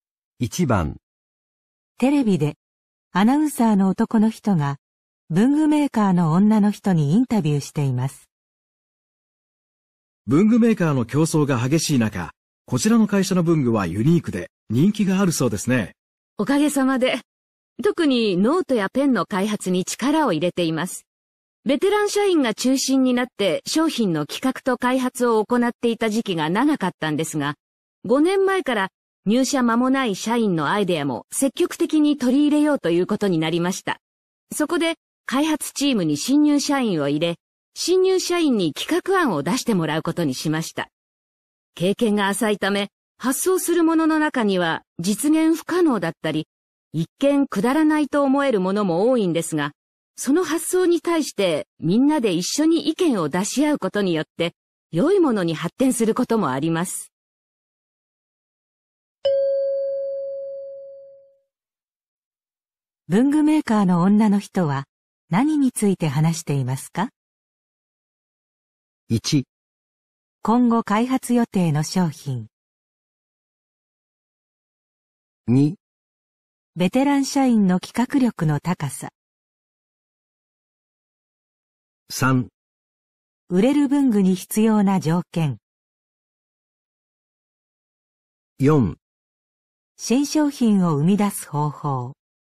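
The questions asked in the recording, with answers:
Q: 文具メーカーの女の人は何について話していますか?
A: 4: 新商品を生み出す方法。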